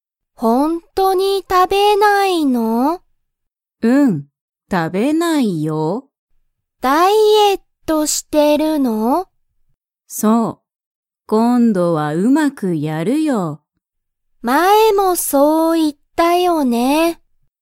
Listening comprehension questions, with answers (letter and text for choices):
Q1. ジュンは____をしている。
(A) 勉強(べんきょう)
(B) 仕事(しごと)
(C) 電話(でんわ)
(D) ダイエット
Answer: (D) ダイエット